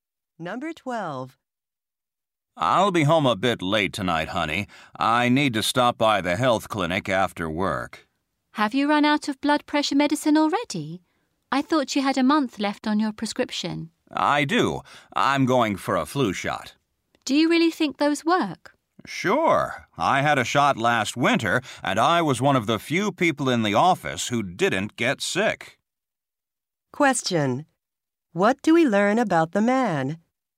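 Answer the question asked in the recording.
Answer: He is getting a flu shot and didn't get sick last winter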